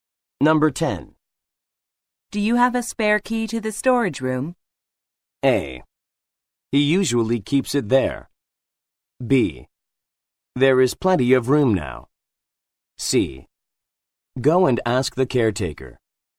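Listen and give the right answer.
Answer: C: Go and ask the caretaker.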